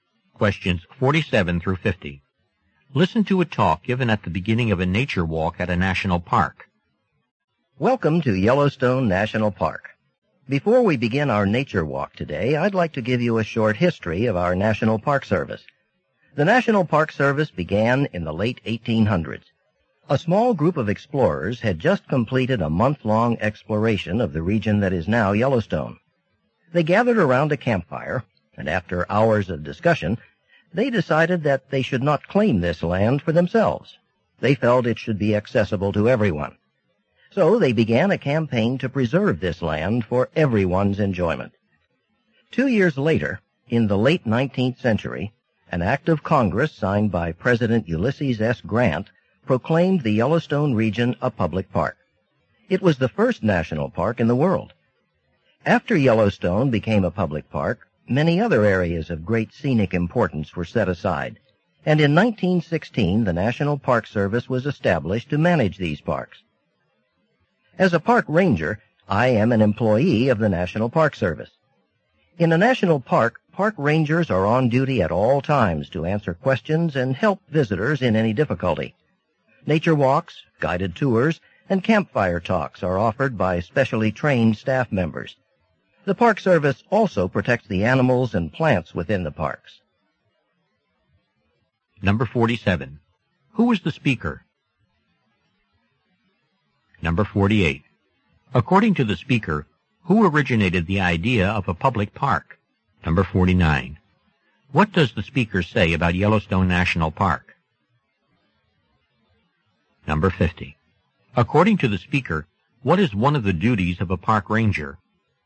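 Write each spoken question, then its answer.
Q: Who was the speaker?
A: A park ranger

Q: According to the speaker, who originated the idea of a public park?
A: A small group of explorers

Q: What does the speaker say about Yellowstone National Park?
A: It was the world's first national park

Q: According to the speaker, what is one of the duties of a park ranger?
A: Answering questions and helping visitors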